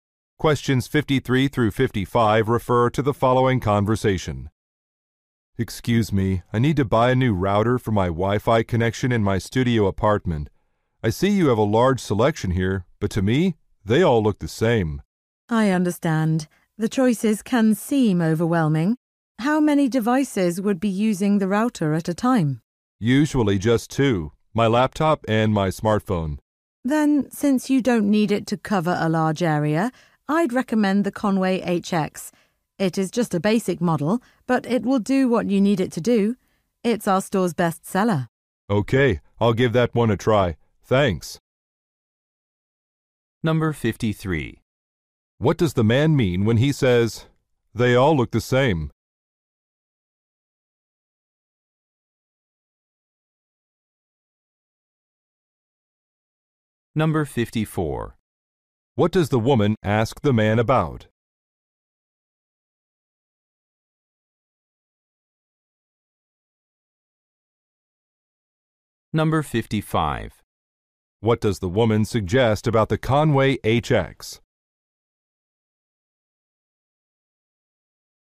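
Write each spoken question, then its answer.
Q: What does the man mean when he says, "They all look the same"?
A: He cannot tell the routers apart

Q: What does the woman ask the man about?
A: How many devices will use the router

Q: What does the woman suggest about the Conway HX?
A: It is a basic model and the store's best seller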